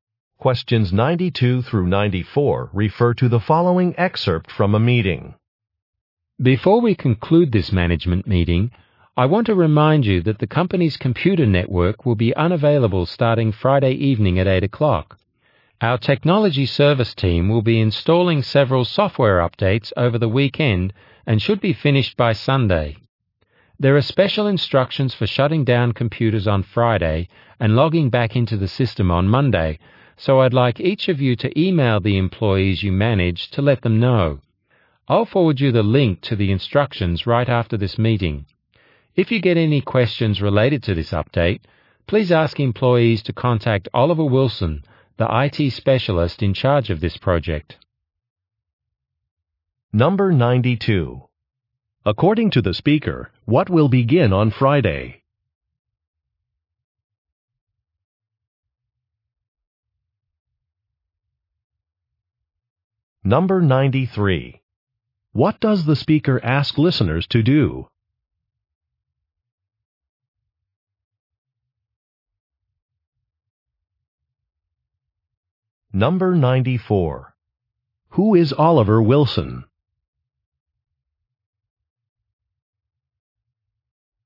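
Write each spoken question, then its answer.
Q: According to the speaker, what will begin on Friday?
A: Software updates; the network will be unavailable

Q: What does the speaker ask listeners to do?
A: Email their employees

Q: Who is Oliver Wilson?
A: An IT specialist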